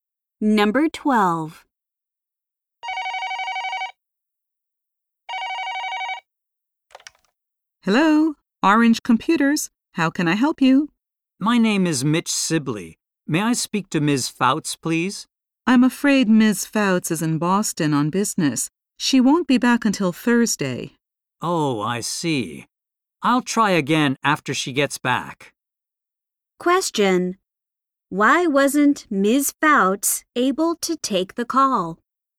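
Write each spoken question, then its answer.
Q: Why wasn't Ms. Fouts able to take the call?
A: She is in Boston on business.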